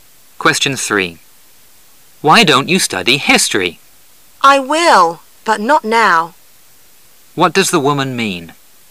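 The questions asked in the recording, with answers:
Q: What does the woman mean?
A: She will study history later, but not now.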